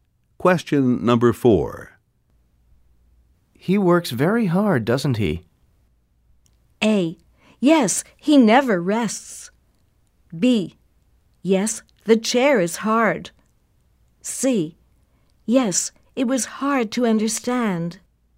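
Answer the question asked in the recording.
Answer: A: Yes, he never rests.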